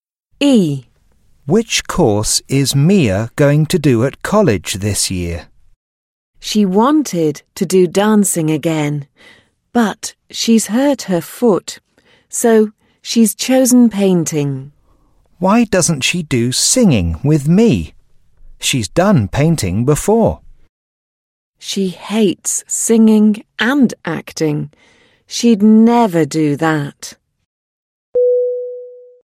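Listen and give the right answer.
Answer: Painting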